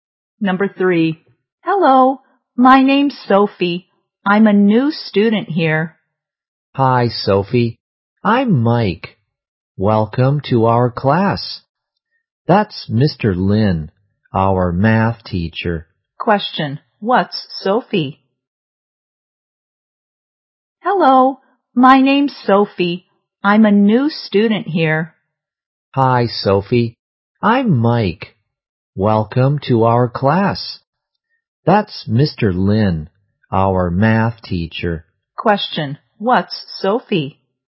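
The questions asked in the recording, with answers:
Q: what's Sophie?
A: A new student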